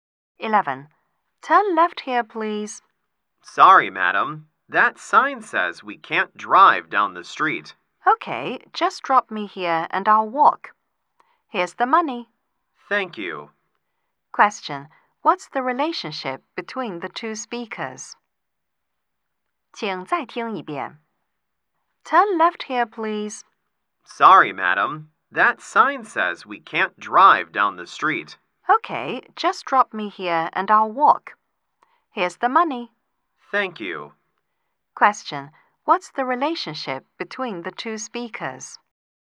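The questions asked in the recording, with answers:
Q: Question. What's the relationship between the two speakers?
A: Taxi driver and passenger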